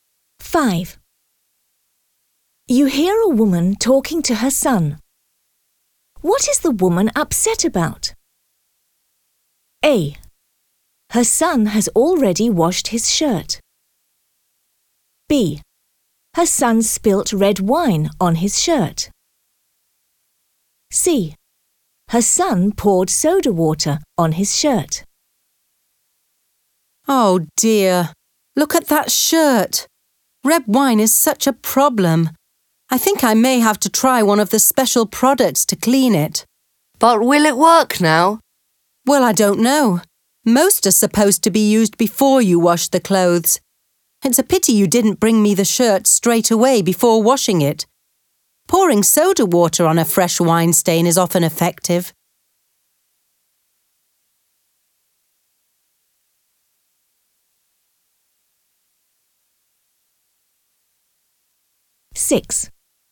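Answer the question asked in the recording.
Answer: A: Her son has already washed his shirt.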